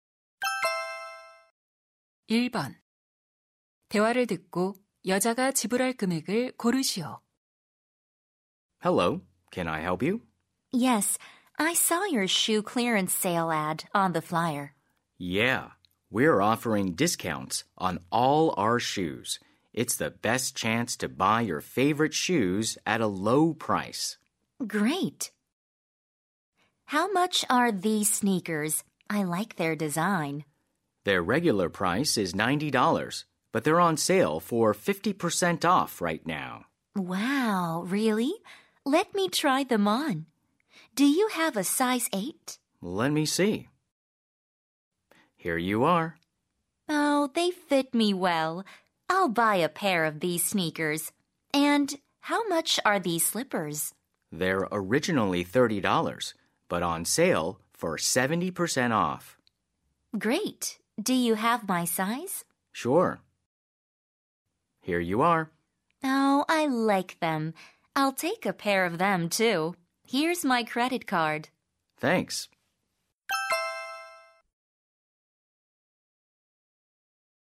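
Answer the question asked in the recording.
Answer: $54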